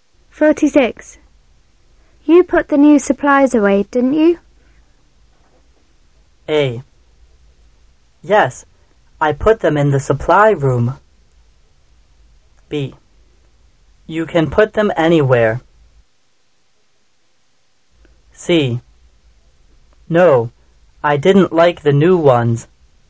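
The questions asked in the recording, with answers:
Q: You put the new supplies away, didn't you?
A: A: Yes, I put them in the supply room.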